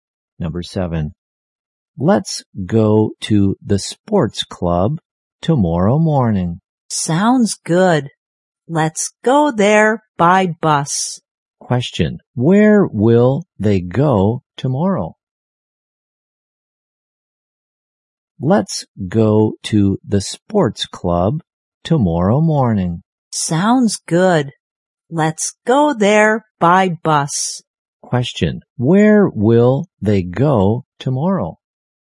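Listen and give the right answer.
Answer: To the sports club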